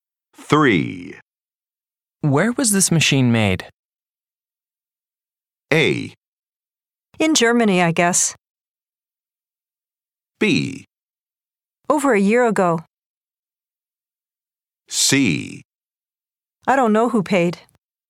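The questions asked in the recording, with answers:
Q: Where was this machine made?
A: A: In Germany, I guess.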